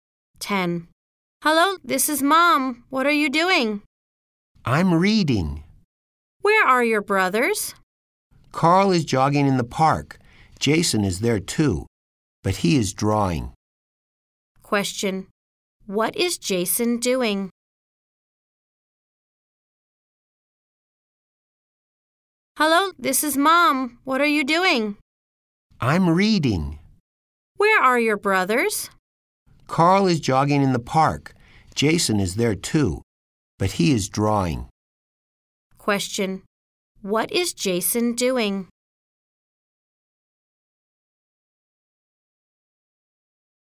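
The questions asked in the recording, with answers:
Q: What is Jason doing?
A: Drawing in the park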